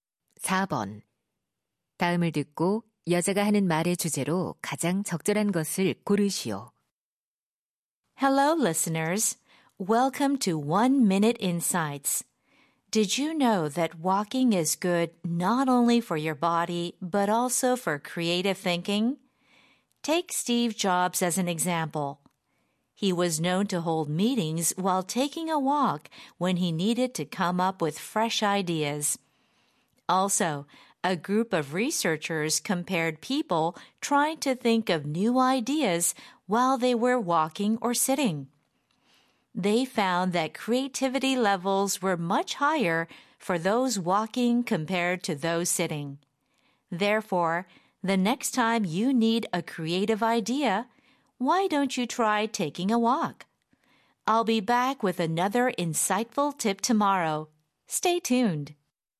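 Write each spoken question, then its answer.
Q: 다음을 듣고 여자가 하는 말의 주제로 가장 적절한 것을 고르시오.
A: 걷기가 창의적 사고에 도움이 된다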